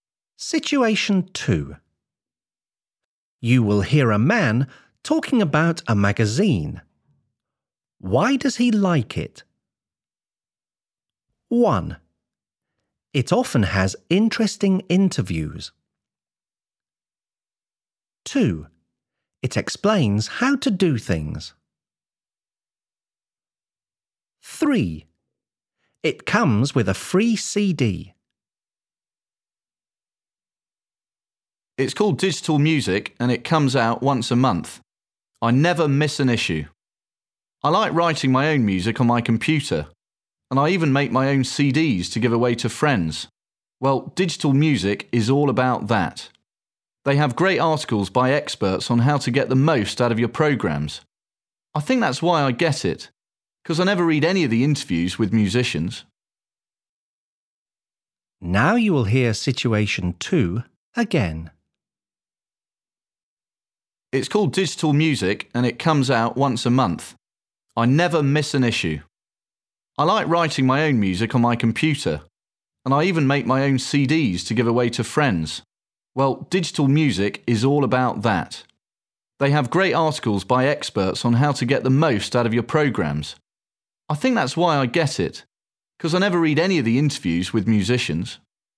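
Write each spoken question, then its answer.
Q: Why does he like it?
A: 2: It explains how to do things.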